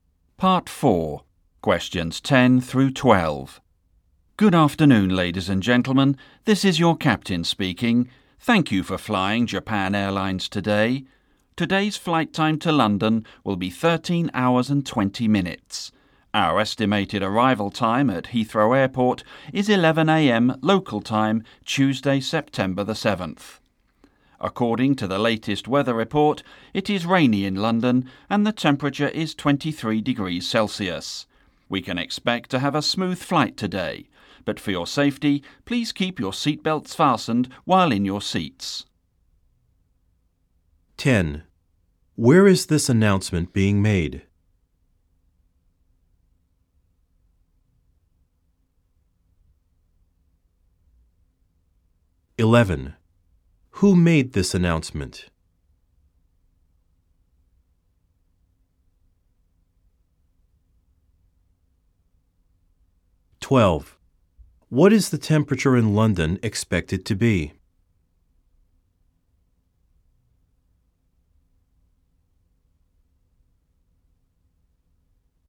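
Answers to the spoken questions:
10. On an airplane
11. The captain
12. 23 degrees Celsius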